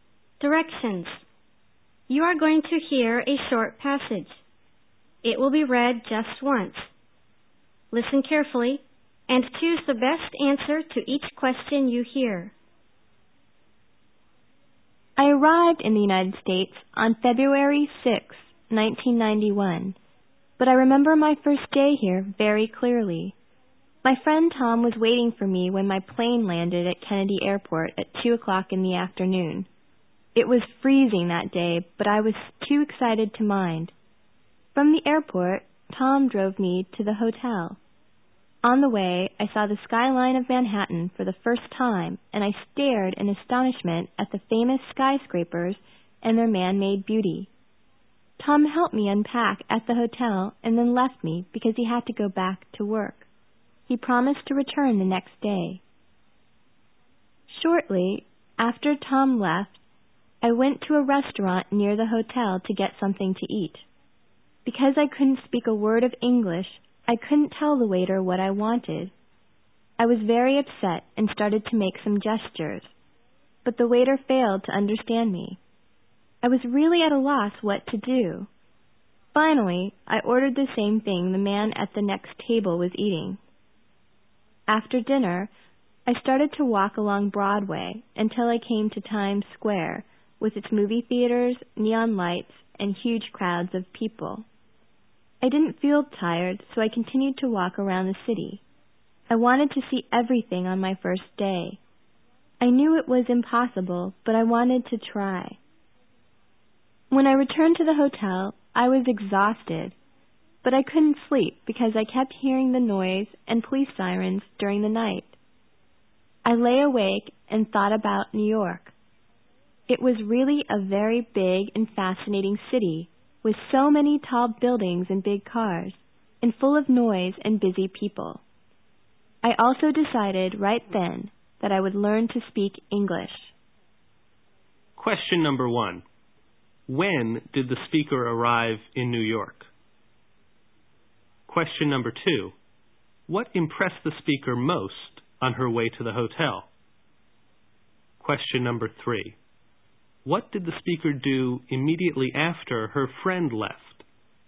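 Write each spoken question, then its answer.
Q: When did the speaker arrive in New York?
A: On February 6, 1991, at 2 o'clock in the afternoon

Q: What impressed the speaker most on her way to the hotel?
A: The Manhattan skyline and its famous skyscrapers

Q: What did the speaker do immediately after her friend left?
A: She went to a restaurant near the hotel to get something to eat.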